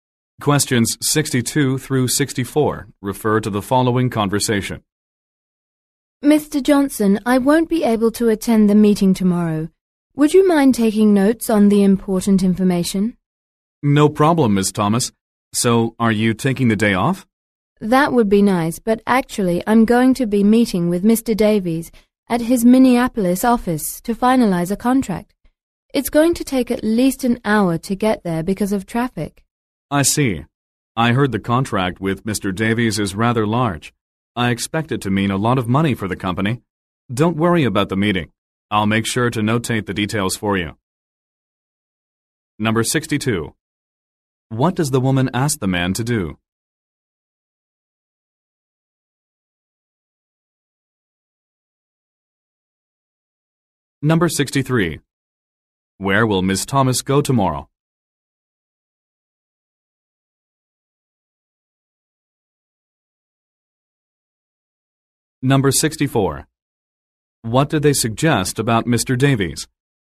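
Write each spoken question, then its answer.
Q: What does the woman ask the man to do?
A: Take notes at the meeting

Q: Where will Ms. Thomas go tomorrow?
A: Mr. Davies's Minneapolis office

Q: What did they suggest about Mr. Davies?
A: His contract is large and will mean a lot of money for the company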